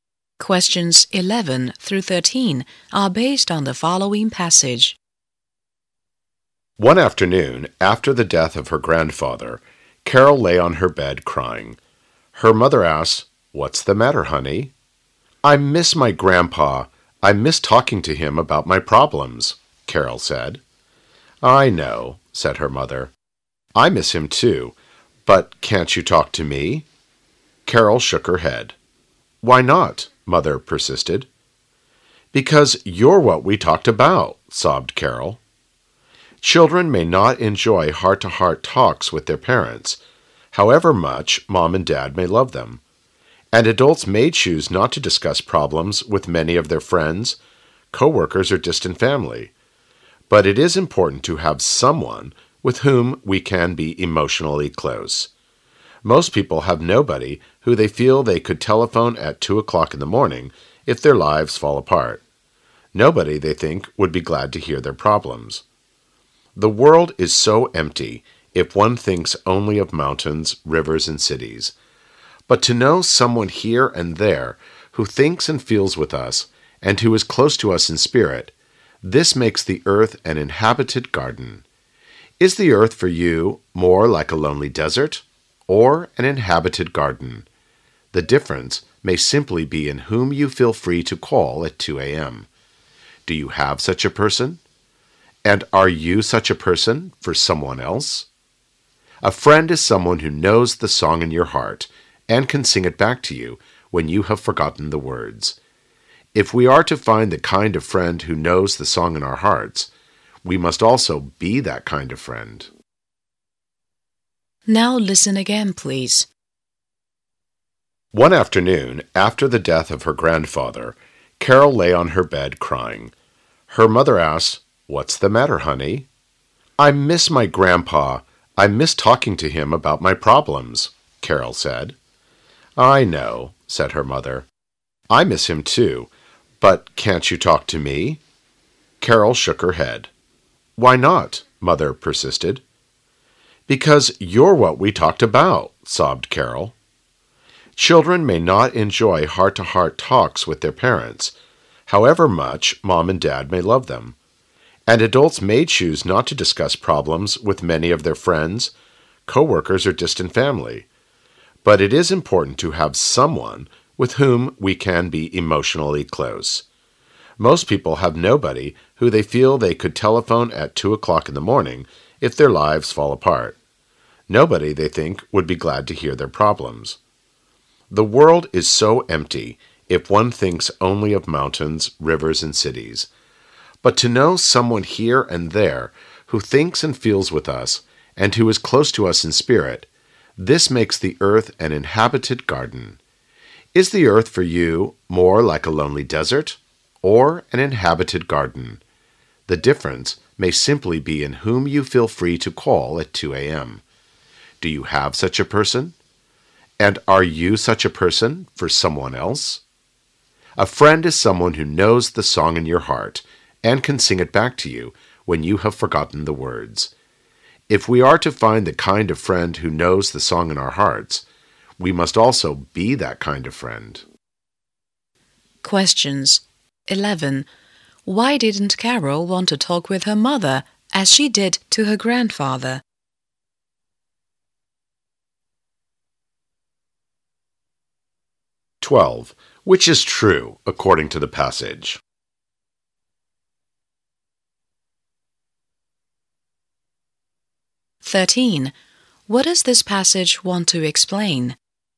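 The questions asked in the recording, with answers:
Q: Why didn't Carol want to talk with her mother as she did to her grandfather?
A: Because her mother was what she talked about with her grandfather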